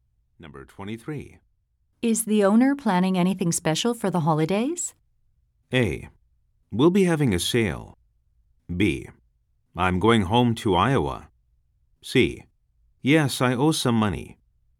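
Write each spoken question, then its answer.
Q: Is the owner planning anything special for the holidays?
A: A: We'll be having a sale.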